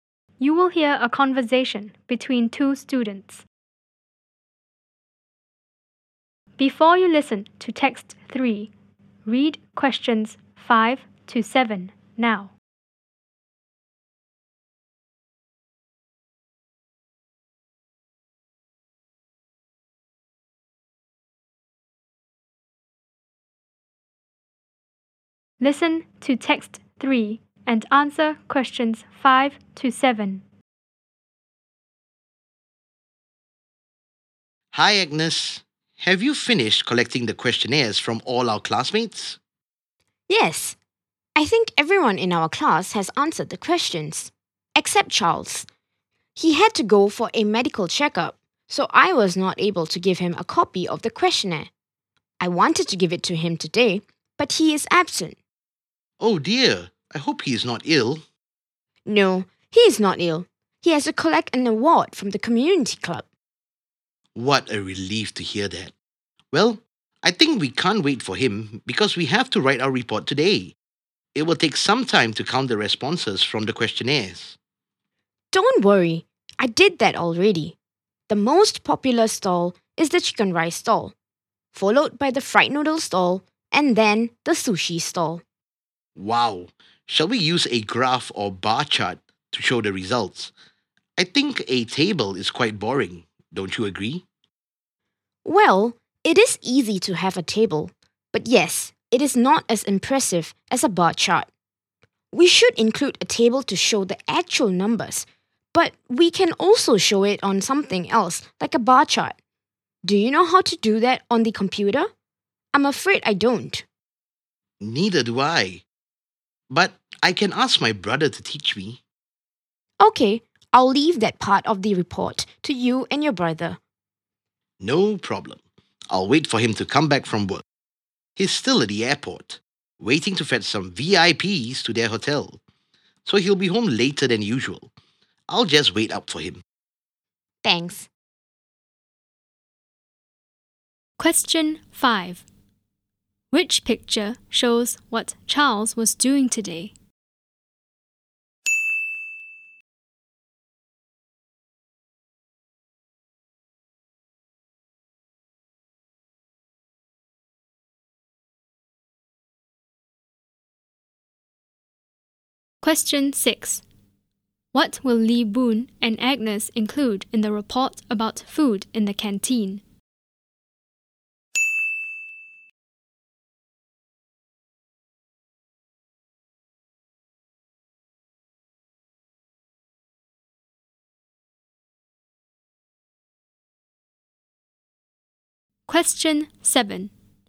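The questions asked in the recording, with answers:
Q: What will Lee Boon and Agnes include in the report about food in the canteen?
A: A table showing the actual numbers and a bar chart of the results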